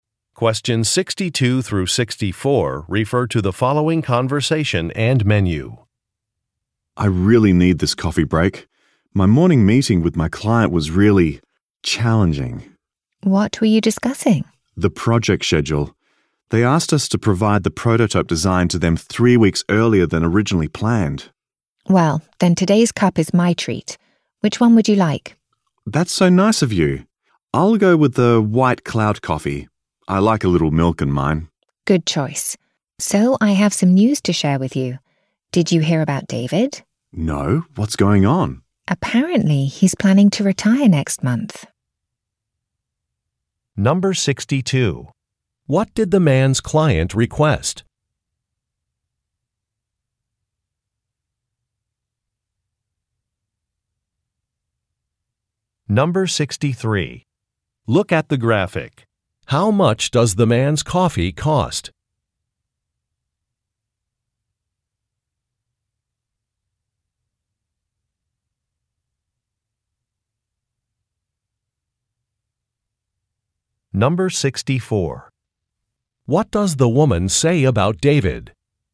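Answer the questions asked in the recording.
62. To receive the prototype design 3 weeks earlier than planned
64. He plans to retire next month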